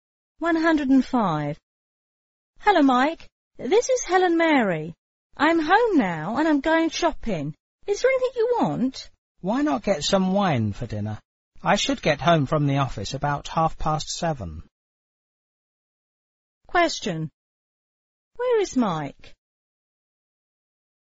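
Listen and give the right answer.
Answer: At the office.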